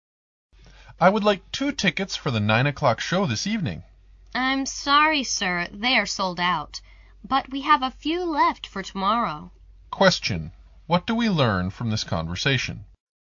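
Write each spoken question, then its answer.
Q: What do we learn from this conversation?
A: Tickets for tonight's 9 o'clock show are sold out, but some are left for tomorrow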